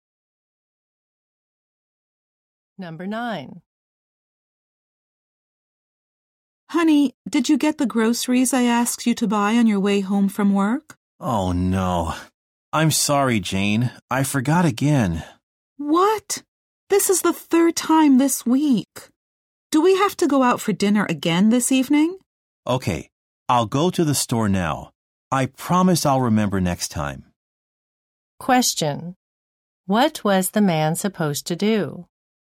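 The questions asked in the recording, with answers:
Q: What was the man supposed to do?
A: Buy groceries on his way home from work.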